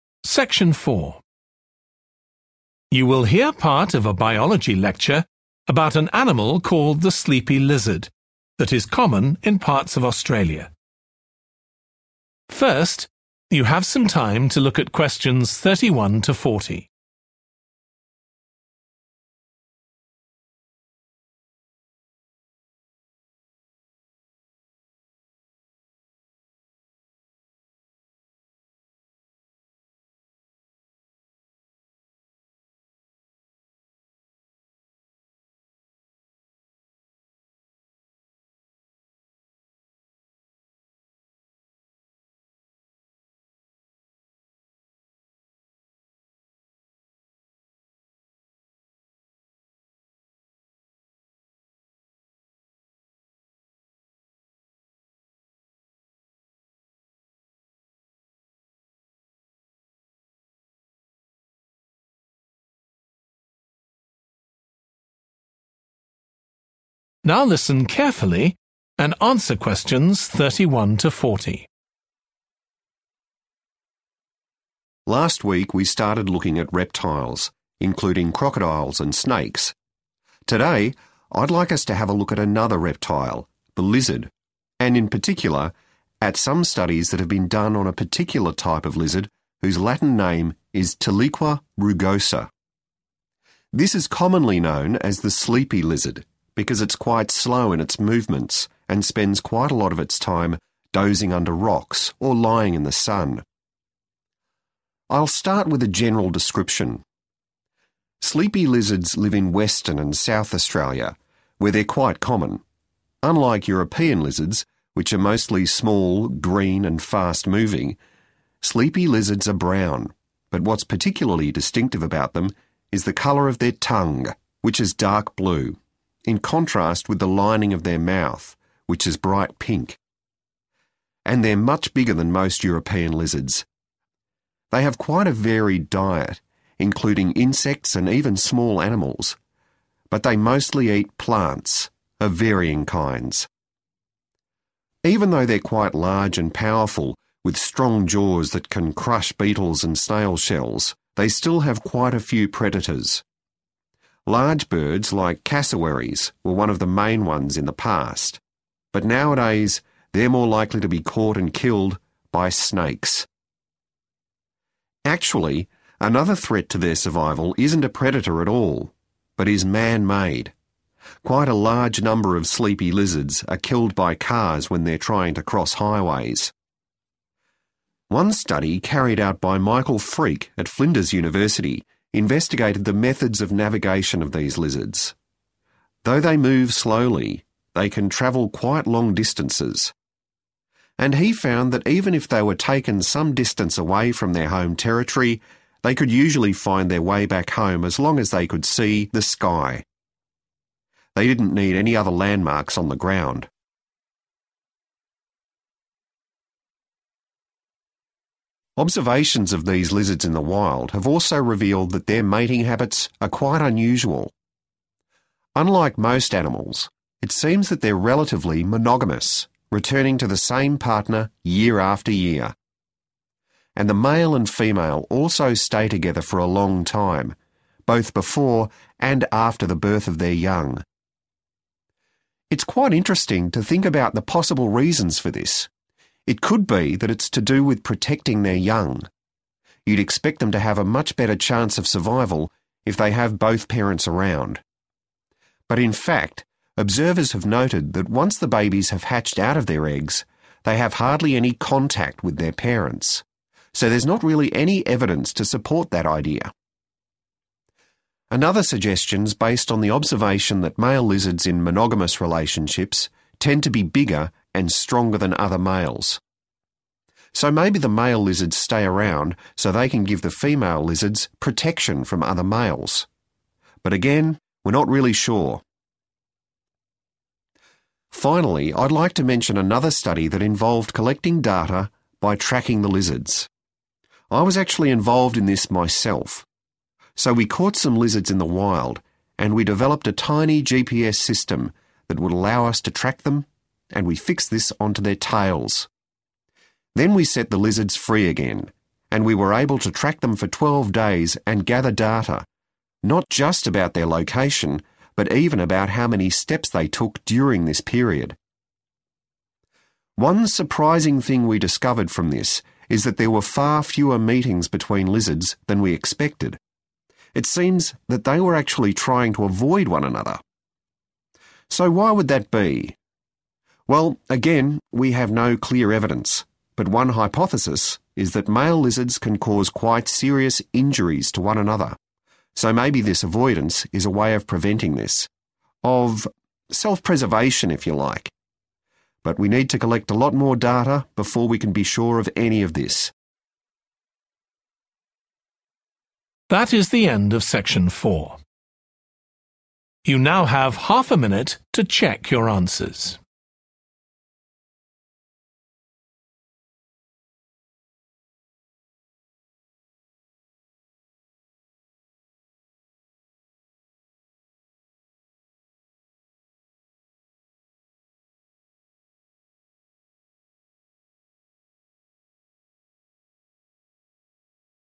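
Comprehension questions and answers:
Complete the notes below. Write ONE WORD ONLY for each answer.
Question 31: They are brown, but recognisable by their blue 31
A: tongue

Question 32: Their diet consists mainly of 32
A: plants

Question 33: Their main predators are large birds and 33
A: snakes

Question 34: One study found that lizards can use the 34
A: sky

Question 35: Observations show that these lizards keep the same 35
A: partner

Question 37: to provide 37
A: protection

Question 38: A study was carried out using GPS systems attached to the 38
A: tails

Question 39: This provided information on the lizards' location and even the number of 39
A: steps

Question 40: This may be in order to reduce chances of 40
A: injuries

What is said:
Last week, we started looking at reptiles, including crocodiles and snakes. Today, I'd like us to have a look at another reptile – the lizard – and in particular, at some studies that have been done on a particular type of lizard whose Latin name is tiliqua rugosa. 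This is commonly known as the sleepy lizard, because it's quite slow in its movements and spends quite a lot of its time dozing under rocks or lying in the sun.
I'll start with a general description. Sleepy lizards live in Western and South Australia, where they're quite common. Unlike European lizards, which are mostly small, green and fast-moving, sleepy lizards are brown, (Q31) but what's particularly distinctive (= recognisable) about them is the colour of their tongue, which is dark blue [nhưng điều đặc biệt về chúng là lưỡi của chúng có màu xanh đậm], in contrast with the lining of their mouth which is bright pink. And they're much bigger than most European lizards.
Even though they're quite large and powerful, with strong jaws that can crush beetles and snail shells, they still have quite a few predators. Actually, another threat to their survival isn't a predator at all, but is man-made – quite a large number of sleepy lizards are killed by cars when they're trying to cross highways.
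One study carried out by Michael Freake at Flinders University investigated the methods of navigation of these lizards. Though they move slowly, they can travel quite long distances. And he found that even if they were taken some distance away from their home territory, (Q34) they could usually find their way back home (= navigate) as long as they could see the sky [chúng thường có thể tìm được đường trở về nhà miễn là chúng có thể nhìn thấy bầu trời] – they didn't need any other landmarks on the ground.
Observations of these lizards in the wild have also revealed that their mating habits are quite unusual. And the male and female also stay together for a long time, both before and after the birth of their young.
It's quite interesting to think about the possible reasons for this. It could be that it's to do with protecting their young – you'd expect them to have a much better chance of survival if they have both parents around. 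So, there's not really any evidence to support that idea.
Another suggestion's based on the observation that male lizards in monogamous relationships tend to be bigger and stronger than other males. But again, we're not really sure.
Finally, I'd like to mention another study that involved collecting data by tracking the lizards. I was actually involved in this myself.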